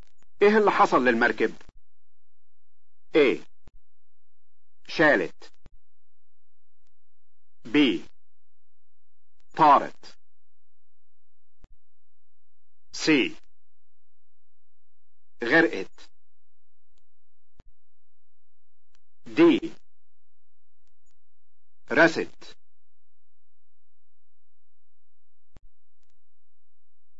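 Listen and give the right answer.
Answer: C: غرقت.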